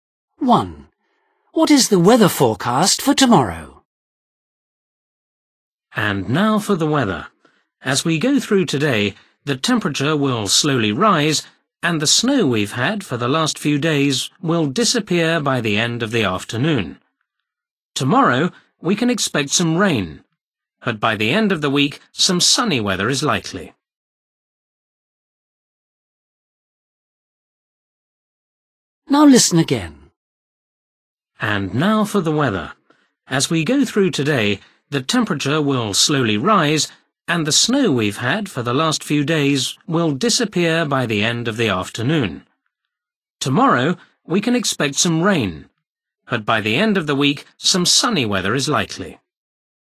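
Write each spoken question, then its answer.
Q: What is the weather forecast for tomorrow?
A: rain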